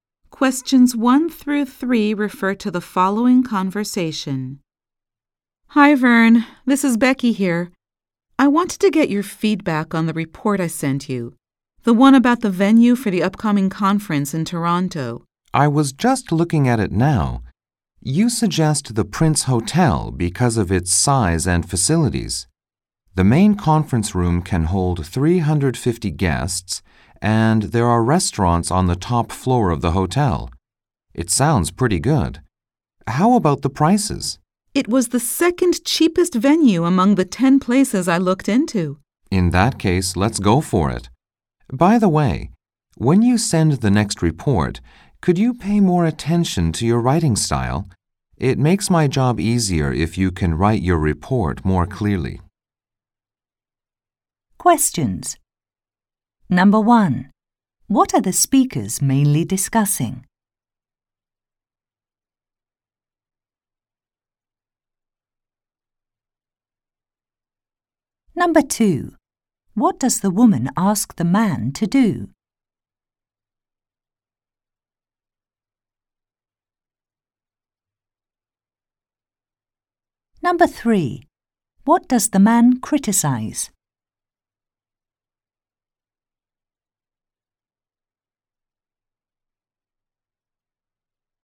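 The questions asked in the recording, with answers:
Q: What are the speakers mainly discussing?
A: A venue for the upcoming conference in Toronto

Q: What does the woman ask the man to do?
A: Give feedback on her report

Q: What does the man criticize?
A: The woman's writing style in the report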